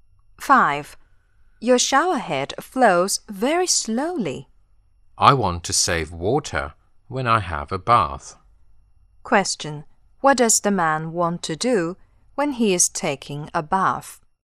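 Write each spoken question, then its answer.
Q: What does the man want to do when he is taking a bath?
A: Save water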